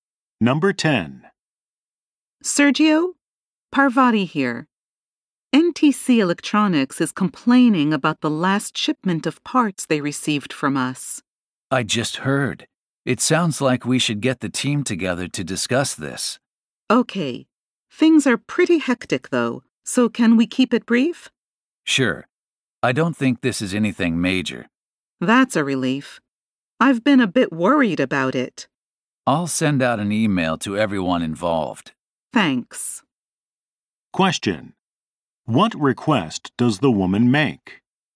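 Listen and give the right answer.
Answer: That they keep the meeting brief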